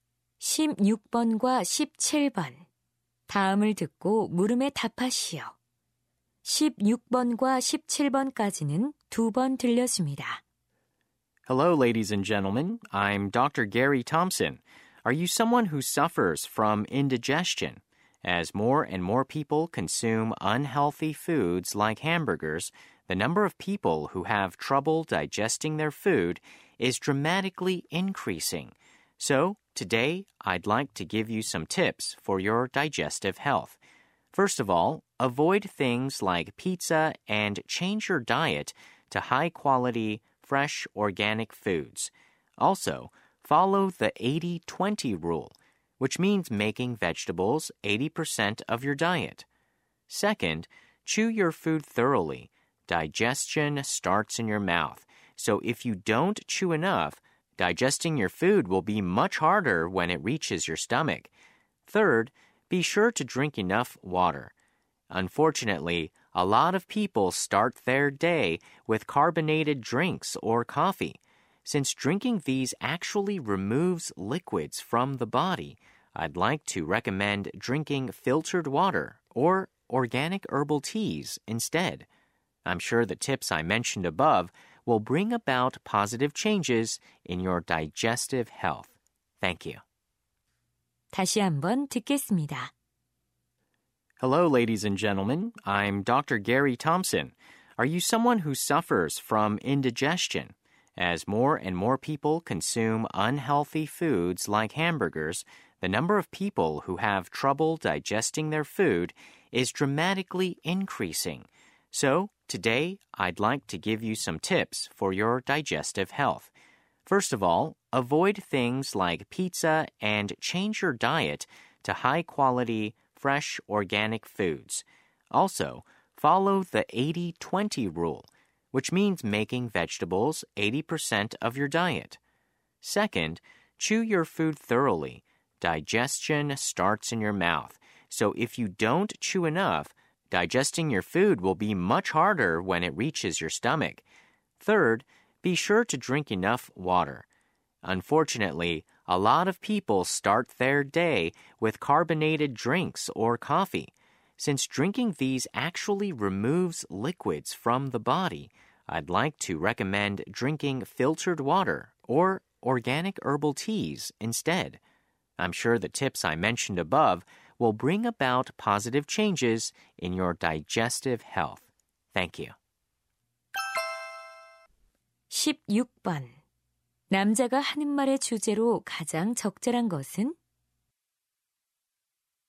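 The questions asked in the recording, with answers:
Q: 남자가 하는 말의 주제로 가장 적절한 것은?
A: 소화 건강을 위한 조언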